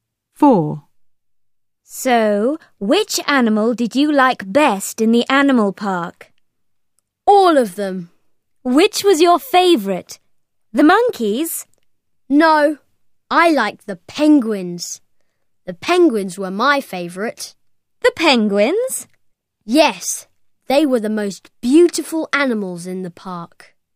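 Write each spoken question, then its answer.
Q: So, which animal did you like best in the animal park?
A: penguins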